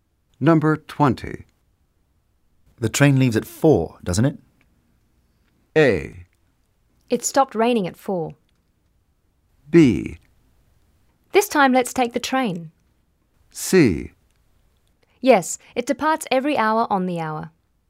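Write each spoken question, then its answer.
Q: The train leaves at 4, doesn't it?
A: C: Yes, it departs every hour on the hour.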